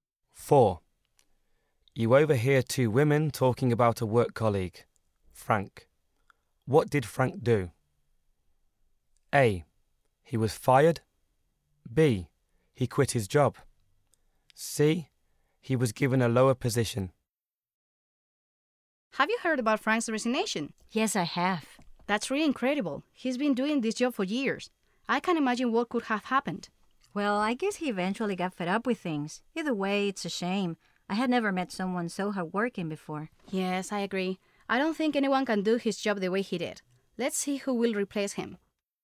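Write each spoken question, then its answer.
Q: What did Frank do?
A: B: He quit his job.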